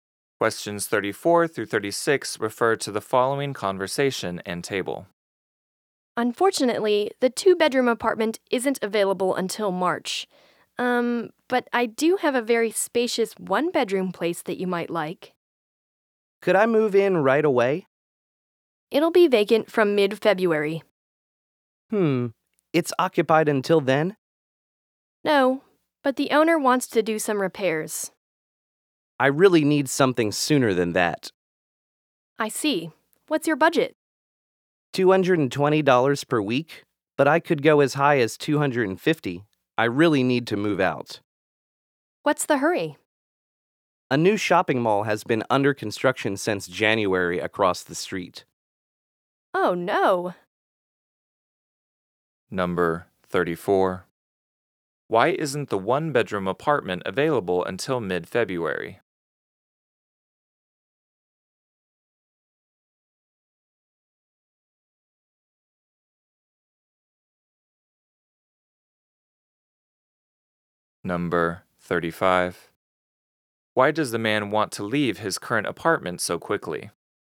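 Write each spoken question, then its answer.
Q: Why isn't the one-bedroom apartment available until mid-February?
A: The owner wants to do some repairs.

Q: Why does the man want to leave his current apartment so quickly?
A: A new shopping mall is being built across the street.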